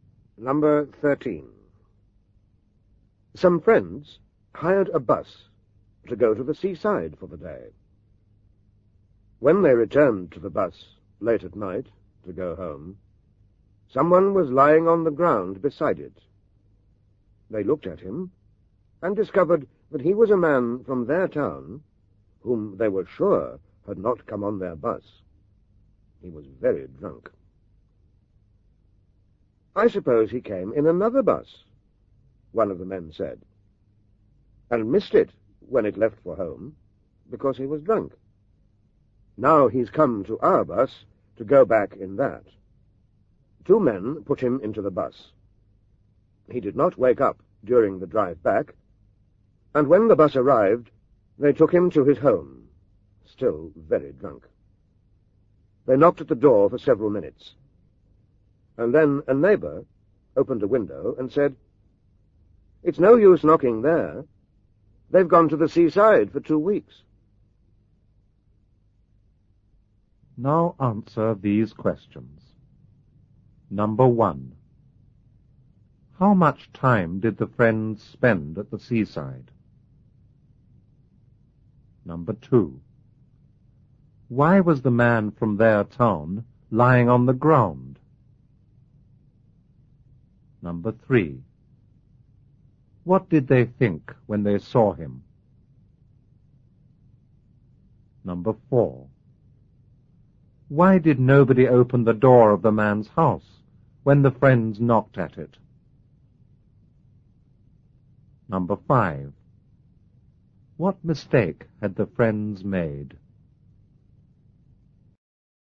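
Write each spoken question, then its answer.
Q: How much time did the friends spend at the seaside?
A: One day

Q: Why was the man from their town lying on the ground?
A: He was very drunk

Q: What did they think when they saw him?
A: That he had come in another bus and missed it when it left because he was drunk

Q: Why did nobody open the door of the man's house when the friends knocked at it?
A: His family had gone to the seaside for two weeks

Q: What mistake had the friends made?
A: The man had not come to the seaside for the day; he was on a two-week holiday there, and they took him home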